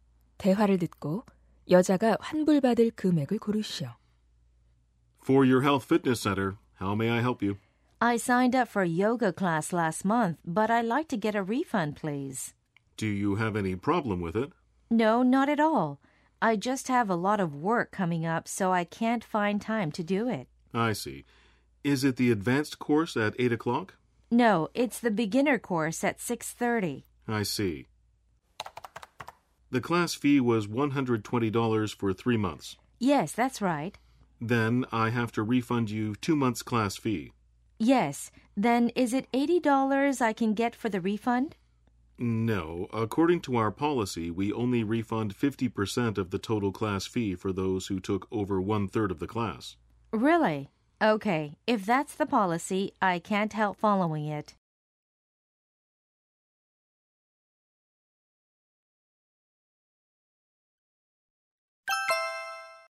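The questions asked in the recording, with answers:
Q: 대화를 듣고 여자가 환불받을 금액을 고르시오.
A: $60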